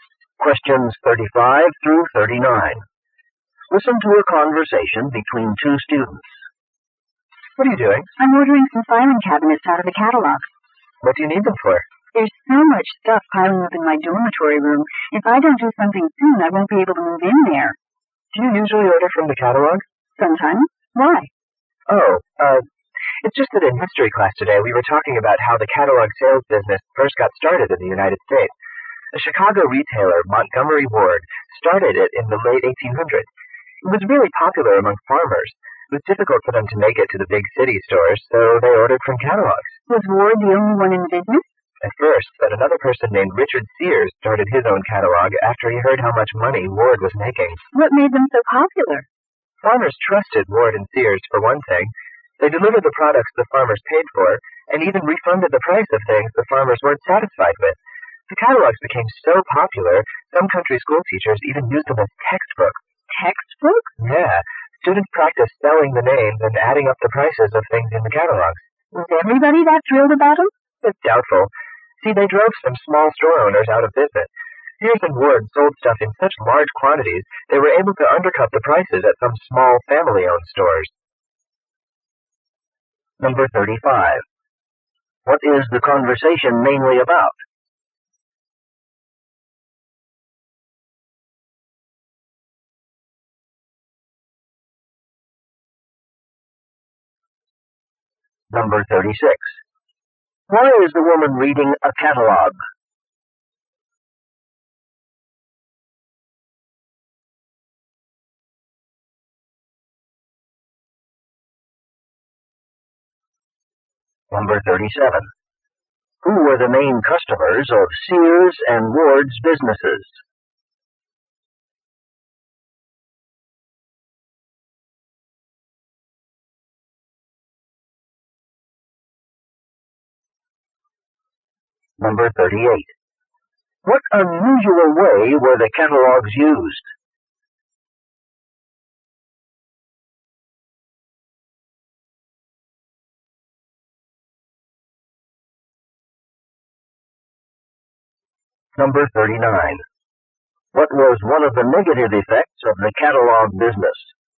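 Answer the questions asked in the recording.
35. The history of the catalog sales business in the United States.
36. To order filing cabinets for her dorm room.
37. Farmers.
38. As textbooks in country schools.
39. It drove some small store owners out of business.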